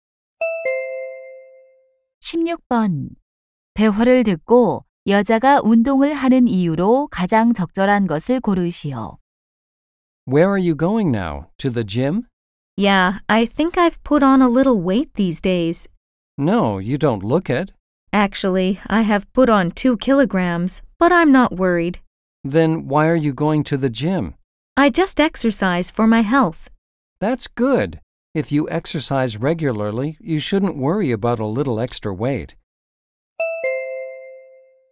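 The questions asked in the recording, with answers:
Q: 대화를 듣고 여자가 운동을 하는 이유로 가장 적절한 것을 고르시오.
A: 건강을 위해서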